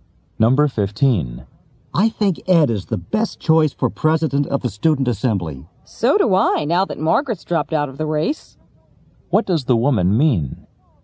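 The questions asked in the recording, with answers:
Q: What does the woman mean?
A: She agrees Ed is the best choice now that Margaret has dropped out.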